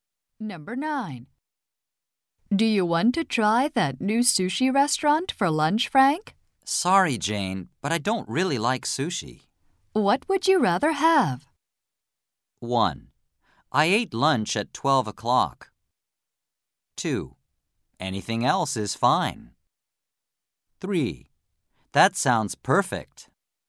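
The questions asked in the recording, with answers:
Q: What would you rather have?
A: 2: Anything else is fine.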